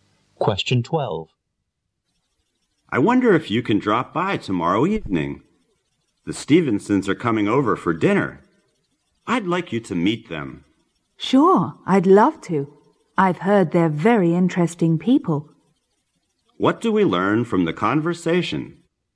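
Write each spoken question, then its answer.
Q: What do we learn from the conversation?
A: The man accepts an invitation to dinner to meet the Stevensons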